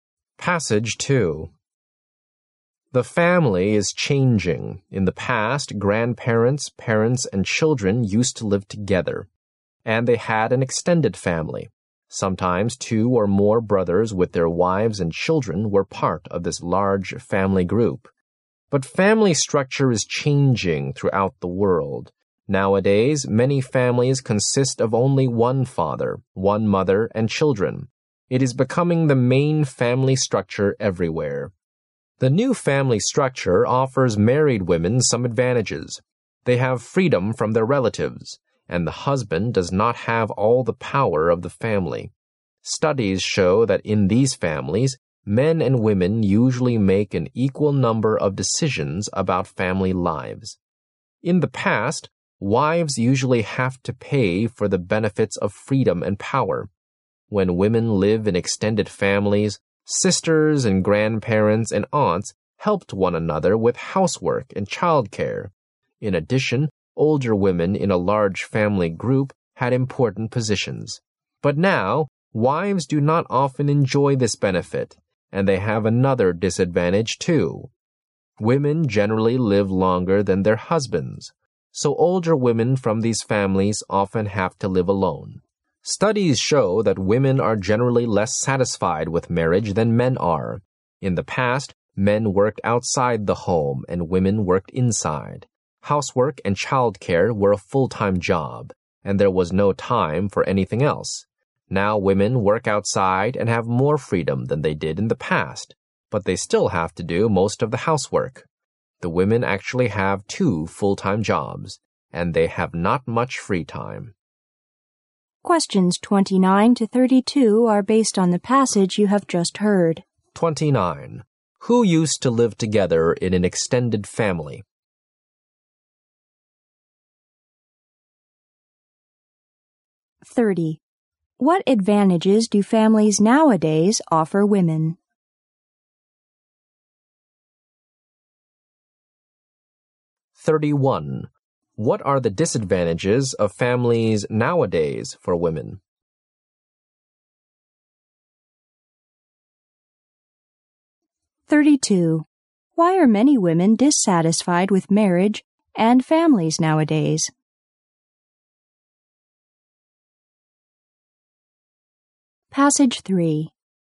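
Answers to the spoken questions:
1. Grandparents, parents and children
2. Freedom from relatives and equal power in family decisions
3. No help with housework and childcare, and older women often live alone
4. They work outside but still do most of the housework, so they have two full-time jobs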